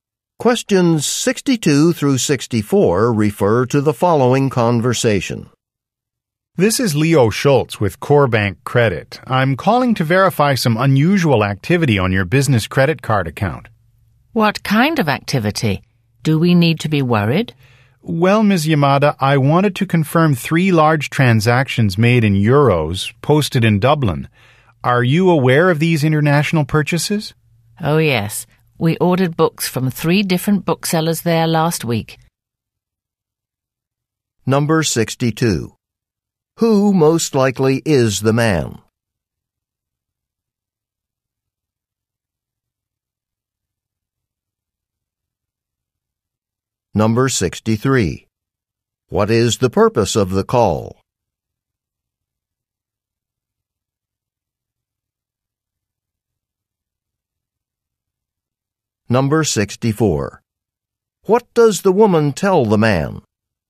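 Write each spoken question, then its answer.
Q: Who most likely is the man?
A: A credit card company employee

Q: What is the purpose of the call?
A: To verify unusual activity on a credit card account

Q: What does the woman tell the man?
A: They ordered books from booksellers in Dublin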